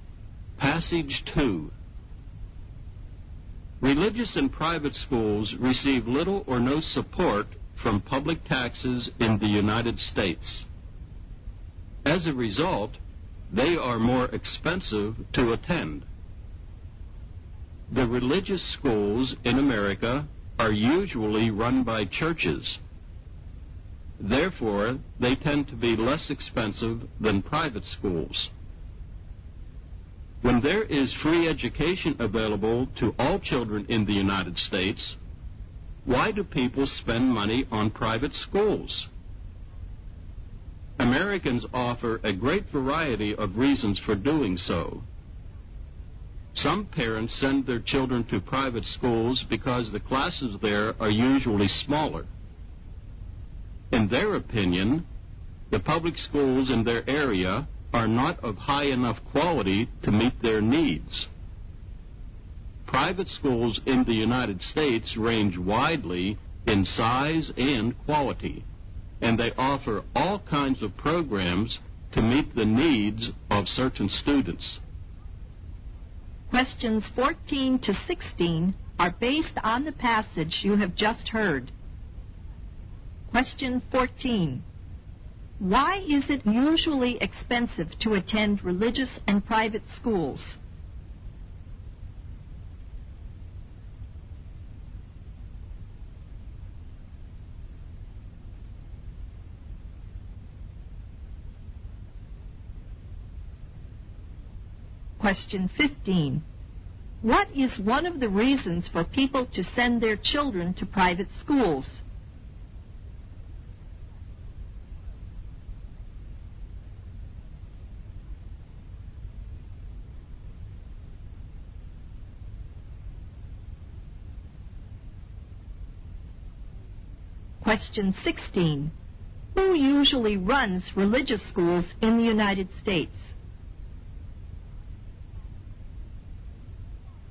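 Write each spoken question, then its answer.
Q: Why is it usually expensive to attend religious and private schools?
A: They receive little or no support from public taxes

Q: What is one of the reasons for people to send their children to private schools?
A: Classes are usually smaller

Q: Who usually runs religious schools in the United States?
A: Churches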